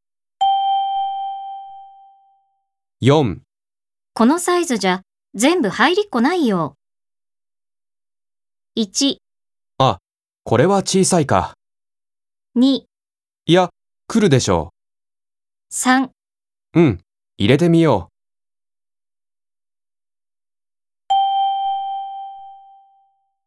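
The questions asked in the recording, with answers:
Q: このサイズじゃ全部入りっこないよ。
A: 1: あ、これは小さいか。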